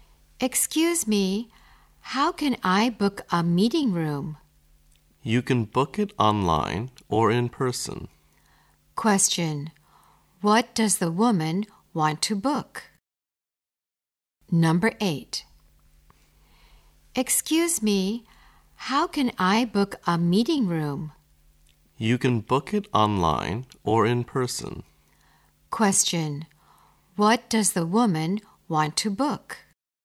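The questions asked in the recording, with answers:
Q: what does the woman want to book?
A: A meeting room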